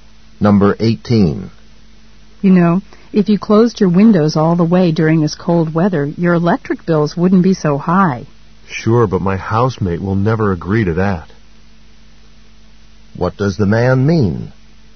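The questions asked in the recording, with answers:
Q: What does the man mean?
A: His housemate won't agree to keep the windows closed.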